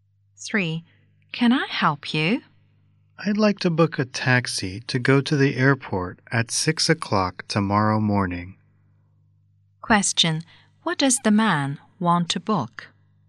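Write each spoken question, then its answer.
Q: What does the man want to book?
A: A taxi to the airport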